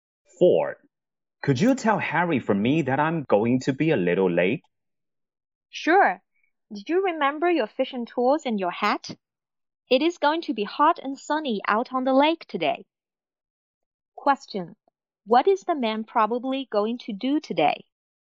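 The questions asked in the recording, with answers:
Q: What is the man probably going to do today?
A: Go fishing on the lake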